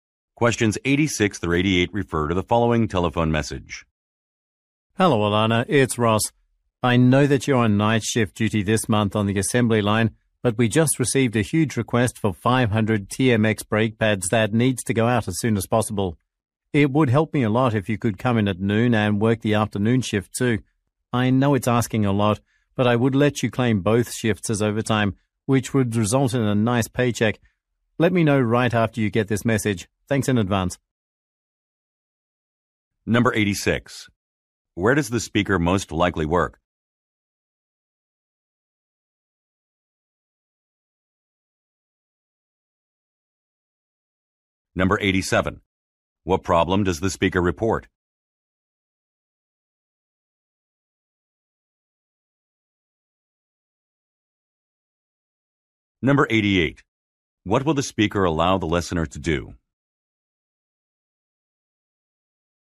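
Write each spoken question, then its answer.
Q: Where does the speaker most likely work?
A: At a factory making brake pads

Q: What problem does the speaker report?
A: A large order must be sent out quickly

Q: What will the speaker allow the listener to do?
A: Claim both shifts as overtime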